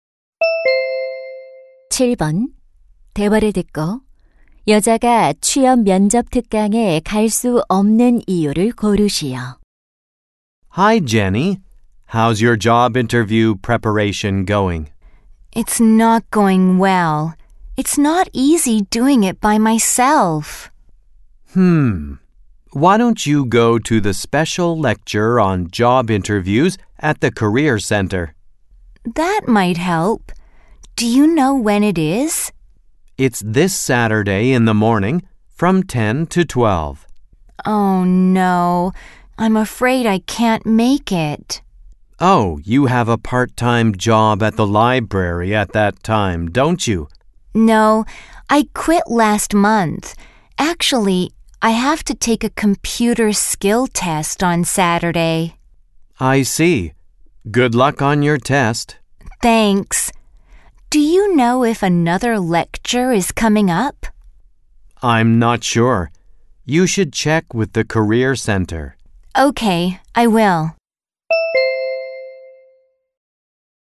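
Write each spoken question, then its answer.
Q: 대화를 듣고 여자가 취업 면접 특강에 갈 수 없는 이유를 고르시오.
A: 컴퓨터 능력 시험을 봐야 해서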